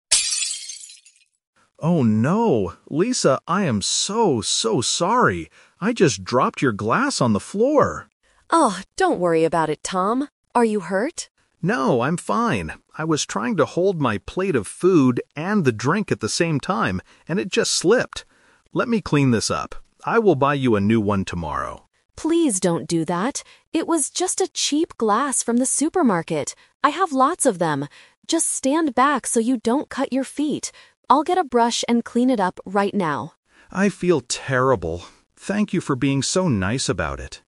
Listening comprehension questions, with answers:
Listen to the conversation and choose the correct answer (A, B, or C).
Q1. Why did Tom drop the glass?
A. The glass was too hot to hold.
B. He was trying to carry too many things.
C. Someone bumped into him.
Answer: B. He was trying to carry too many things.

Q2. What does Tom offer to do?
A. Buy a new glass for Lisa.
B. Go to the supermarket.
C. Cook some new food.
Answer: A. Buy a new glass for Lisa.

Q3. What is Lisa going to do next?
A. Stand back from the glass.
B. Throw away Tom's plate of food.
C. Clean the floor with a brush.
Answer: C. Clean the floor with a brush.

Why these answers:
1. Tom explains, "I was trying to hold my plate of food and the drink at the same time." Trap: Options (A) and (C) are common reasons for dropping things at a party, but they are not mentioned in the audio.
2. Tom says, "I will buy you a new one tomorrow." Trap: Option (B) is a trap because the word "supermarket" is mentioned by Lisa (where she bought the glass), but Tom does not offer to go there. Option (C) uses the word "food," which was on his plate, but he didn't drop the food.
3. Lisa says, "I'll get a brush and clean it up right now." Trap: Option (A) is a trap. Standing back is what Lisa tells Tom to do ("stand back so you don't cut your feet"), not what she is going to do.

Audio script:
Tom: Oh no! Lisa, I am so, so sorry. I just dropped your glass on the floor.
Lisa: Oh, don't worry about it, Tom. Are you hurt?
Tom: No, I'm fine. I was trying to hold my plate of food and the drink at the same time, and it just slipped. Let me clean this up. I will buy you a new one tomorrow.
Lisa: Please don't do that. It was just a cheap glass from the supermarket. I have lots of them. Just stand back so you don't cut your feet. I'll get a brush and clean it up right now.

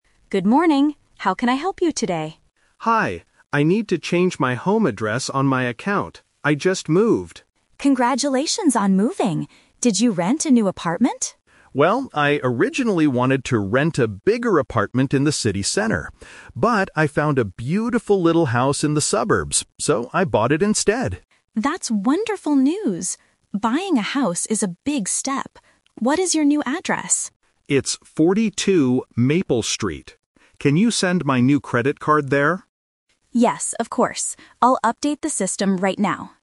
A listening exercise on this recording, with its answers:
Listen to a conversation between a bank teller and a customer. For each question, choose the correct answer (A, B, or C).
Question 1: Why is the customer at the bank?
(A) To ask for a loan to buy a house.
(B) To update his home address.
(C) To open a new bank account.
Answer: (B) To update his home address.

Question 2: What did the customer do?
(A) He rented a large apartment in the city.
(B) He bought a small house in the suburbs.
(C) He sold his old house to a friend.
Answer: (B) He bought a small house in the suburbs.

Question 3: What does the customer want the bank to send to his new address?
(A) A new credit card.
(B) A letter from the bank manager.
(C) A new account book.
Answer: (A) A new credit card.

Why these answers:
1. The customer clearly says at the beginning, "I need to change my home address on my account" (Option B - Key). Option A is a trap because he mentions buying a house, but he already bought it and is not asking for a loan. Option C is a logical guess for a bank visit but is not mentioned.
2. The teller asks if he rented an apartment, and the customer says he "originally wanted to rent a bigger apartment" (Option A - Trap). However, he uses "But" to show a change of plan: he found a little house and "bought it instead" (Option B - Key). Option C is not mentioned.
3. After giving his new address, the customer asks, "Can you send my new credit card there?" (Option A - Key). Options B and C are plausible things a bank might send, but they are not mentioned in the audio.

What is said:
Bank Teller: Good morning. How can I help you today?
Customer: Hi. I need to change my home address on my account. I just moved.
Bank Teller: Congratulations on moving! Did you rent a new apartment?
Customer: Well, I originally wanted to rent a bigger apartment in the city center. But, I found a beautiful little house in the suburbs, so I bought it instead.
Bank Teller: That's wonderful news! Buying a house is a big step. What is your new address?
Customer: It's 42 Maple Street. Can you send my new credit card there?

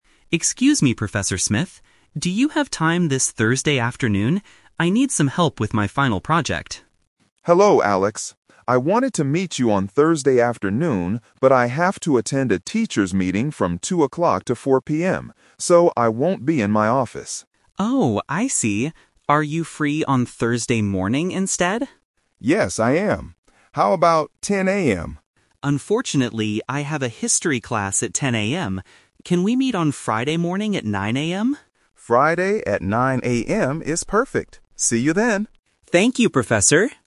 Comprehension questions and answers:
Listen to the conversation and choose the correct answer (A, B, or C).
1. When will the student and the professor finally meet?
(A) Thursday afternoon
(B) Thursday morning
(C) Friday morning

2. Why is the professor busy on Thursday afternoon?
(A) He has a teachers' meeting.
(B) He has to teach a history class.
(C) He is helping another student.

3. What does the student need help with?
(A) A history test.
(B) His final project.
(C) Some math homework.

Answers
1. (C) Friday morning
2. (A) He has a teachers' meeting.
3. (B) His final project.

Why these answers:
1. They agree to meet on "Friday morning at 9:00 AM" at the end of the conversation. Option (A) is a trap because it is the student's first idea, but the professor is busy. Option (B) is a trap because the professor is free, but the student has a class.
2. The professor says, "I have to attend a teachers' meeting." Option (B) is a trap because the "history class" is the student's schedule, not the professor's. Option (C) is a plausible reason for a professor to be busy, but it is not mentioned in the audio.
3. The student says, "I need some help with my final project." Option (A) is a trap because the audio mentions a "history class", not a history test. Option (C) is a plausible answer for a student asking for help, but it is not mentioned.

